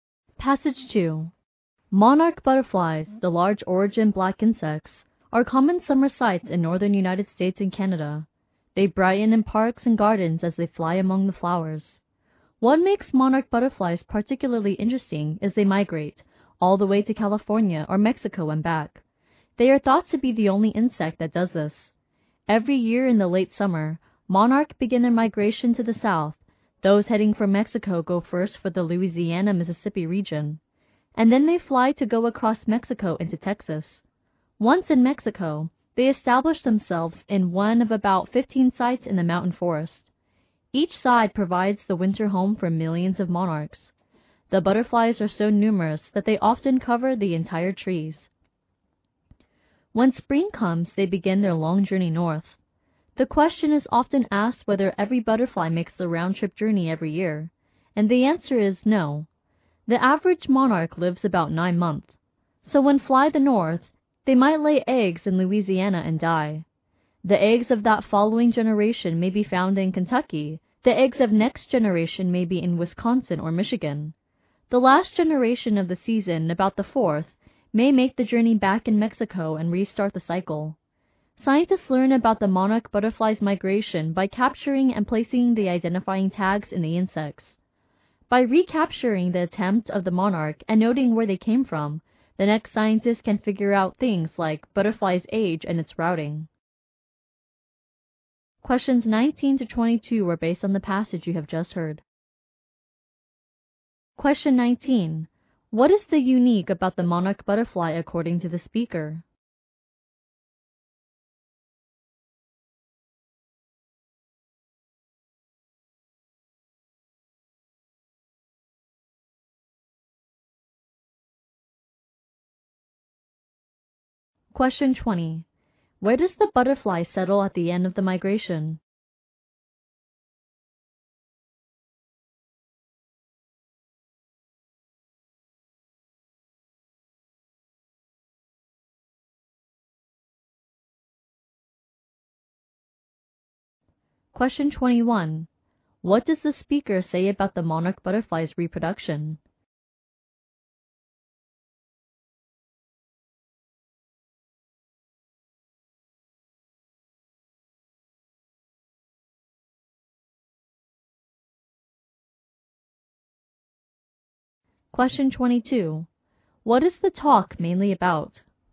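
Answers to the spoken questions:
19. It is the only insect that migrates there and back.
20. In the mountain forests of Mexico.
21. Several generations are born during the round trip.
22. The migration of monarch butterflies.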